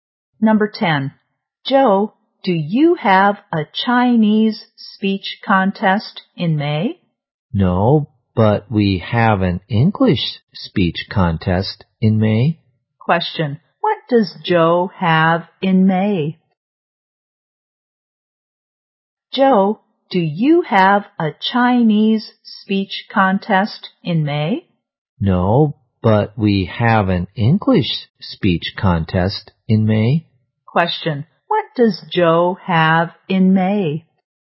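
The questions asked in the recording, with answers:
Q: what does Joe have in May?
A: An English speech contest.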